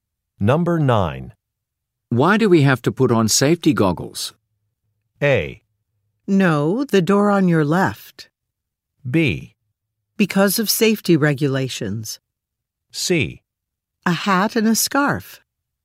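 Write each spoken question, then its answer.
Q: Why do we have to put on safety goggles?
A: B: Because of safety regulations.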